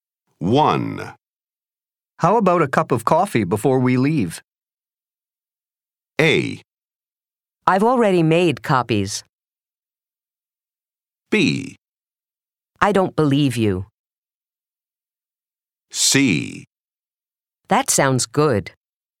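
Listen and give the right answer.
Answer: C: That sounds good.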